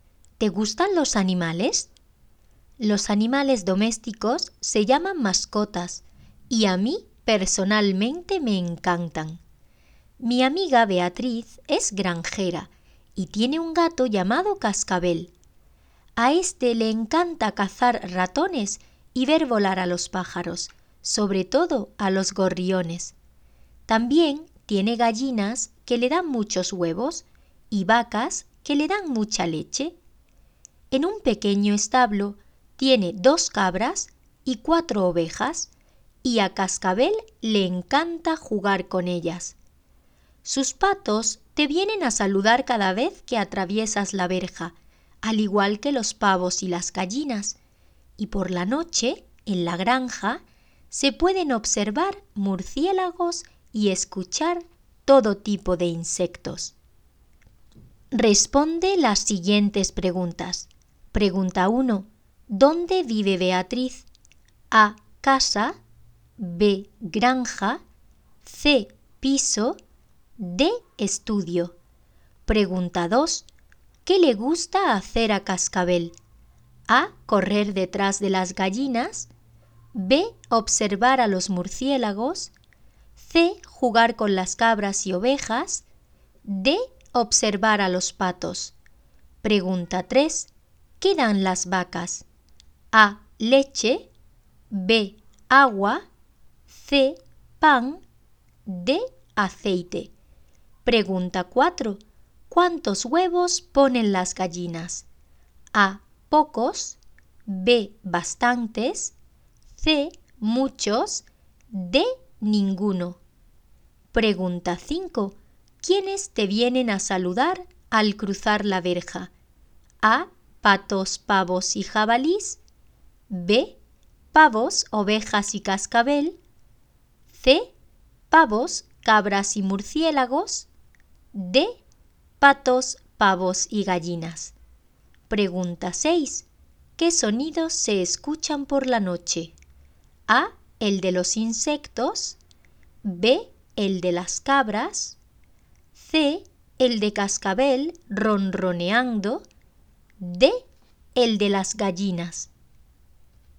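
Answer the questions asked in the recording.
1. B: Granja
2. C: Jugar con las cabras y ovejas
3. A: Leche
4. C: Muchos
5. D: Patos, pavos y gallinas
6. A: El de los insectos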